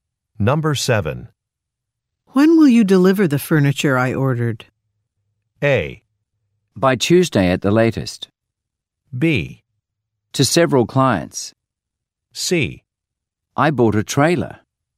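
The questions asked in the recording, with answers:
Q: When will you deliver the furniture I ordered?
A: A: By Tuesday at the latest.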